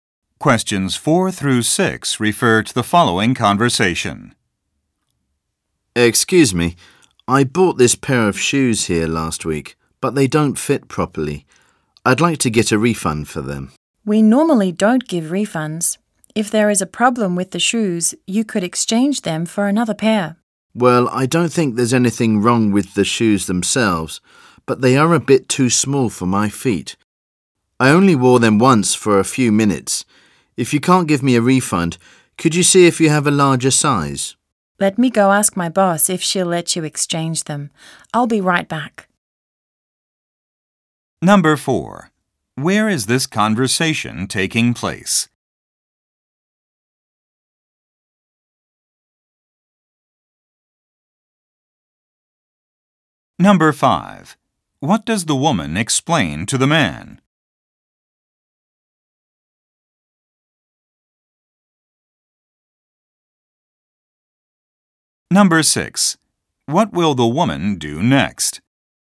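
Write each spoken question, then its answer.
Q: Where is this conversation taking place?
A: In a shoe store

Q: What does the woman explain to the man?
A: They normally don't give refunds

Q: What will the woman do next?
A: Ask her boss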